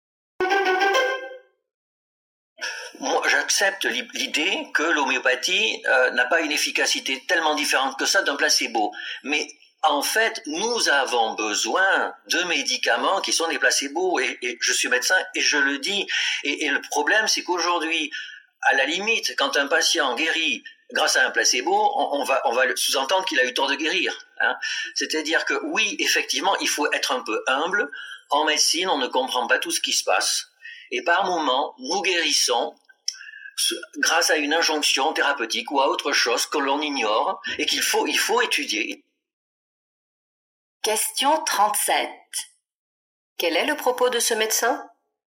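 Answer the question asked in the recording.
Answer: Les placebos comme l'homéopathie sont utiles et il faut rester humble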